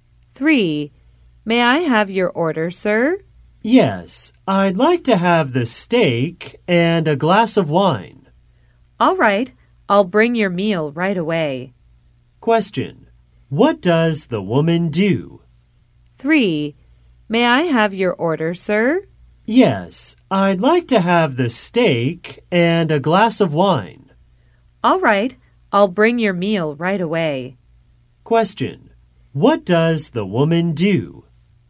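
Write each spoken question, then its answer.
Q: What does the woman do?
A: She is a waitress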